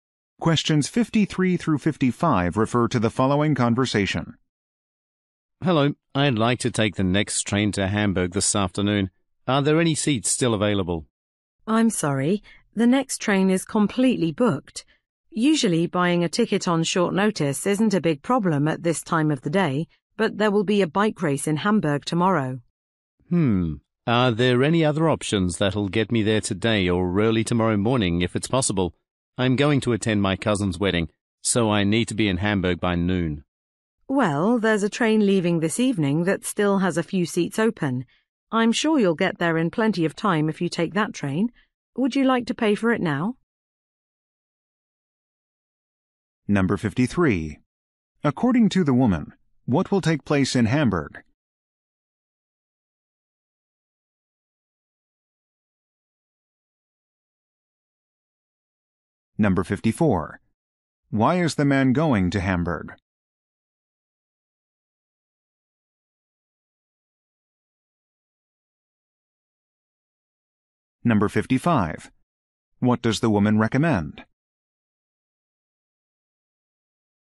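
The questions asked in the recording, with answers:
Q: According to the woman, what will take place in Hamburg?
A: A bike race

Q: Why is the man going to Hamburg?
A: To attend his cousin's wedding

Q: What does the woman recommend?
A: Taking a train this evening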